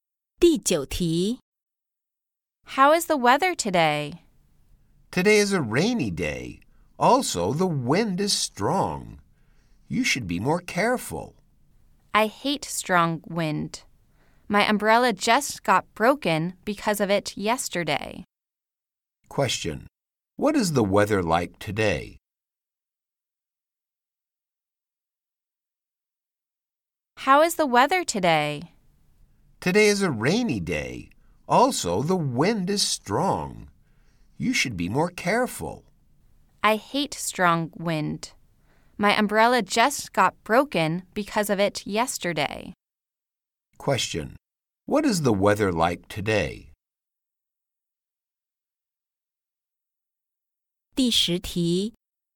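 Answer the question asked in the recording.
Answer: Rainy and windy.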